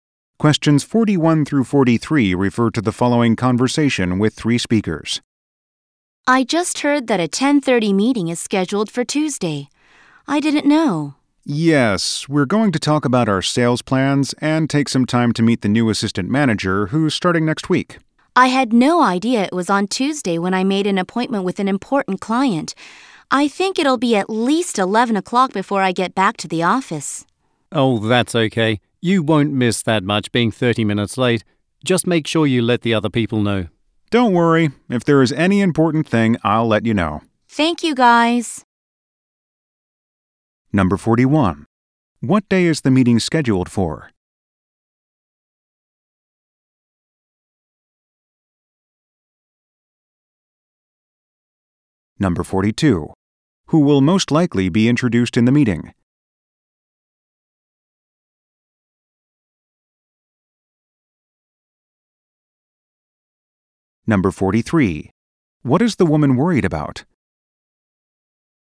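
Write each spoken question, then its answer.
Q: What day is the meeting scheduled for?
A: Tuesday

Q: Who will most likely be introduced in the meeting?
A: The new assistant manager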